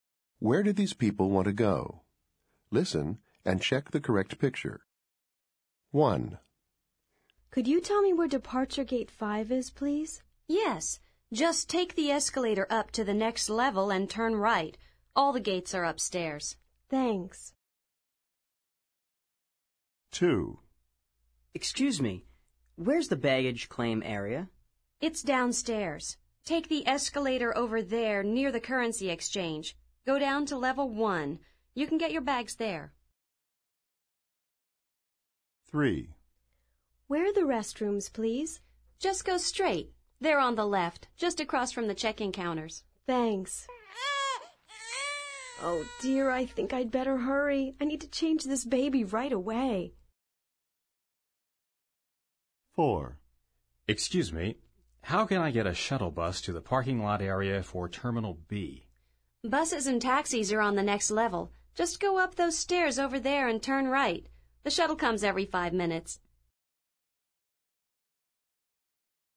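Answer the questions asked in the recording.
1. Departure Gate 5
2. The baggage claim area
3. The restrooms
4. The shuttle bus to the parking lot area for Terminal B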